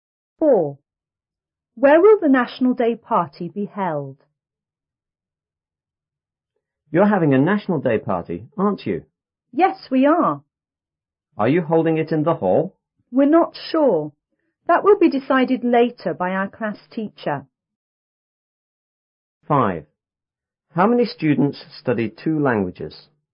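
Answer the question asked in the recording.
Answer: Not sure yet; the class teacher will decide.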